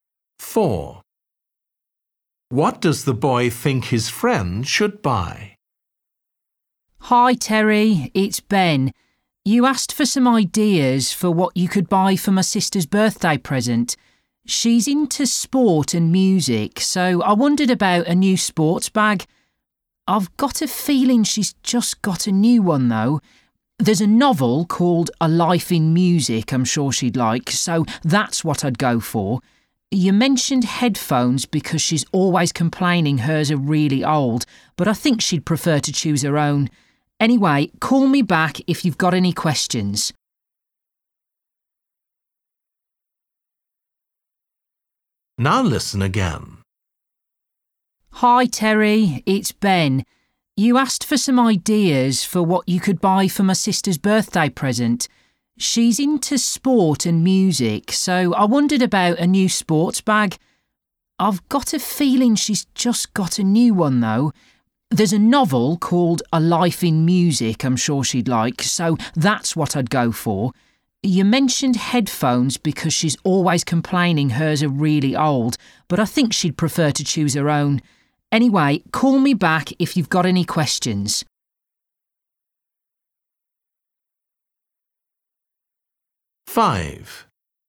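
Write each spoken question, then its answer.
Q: What does the boy think his friend should buy?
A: A novel (A Life in Music)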